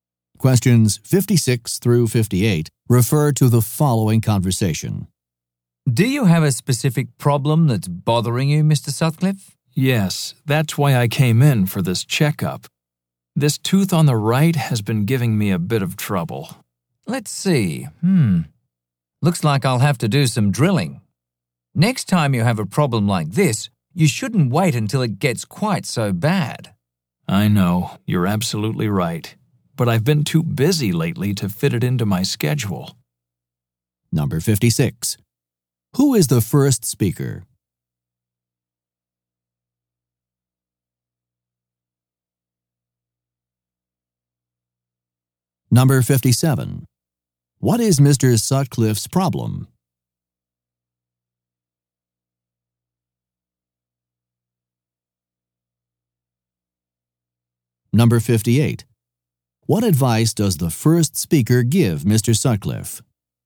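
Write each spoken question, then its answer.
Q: Who is the first speaker?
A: A dentist

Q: What is Mr. Sutcliffe's problem?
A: A tooth on the right is hurting

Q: What advice does the first speaker give Mr.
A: Not to wait so long before coming in with a problem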